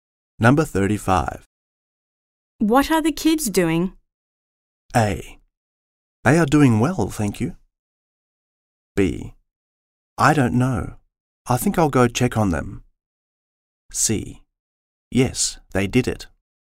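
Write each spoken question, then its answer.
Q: What are the kids doing?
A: B: I don't know. I think I'll go check on them.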